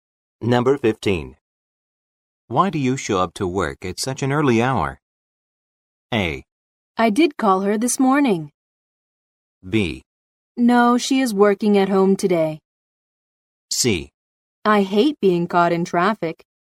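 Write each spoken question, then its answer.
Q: Why do you show up to work at such an early hour?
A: C: I hate being caught in traffic.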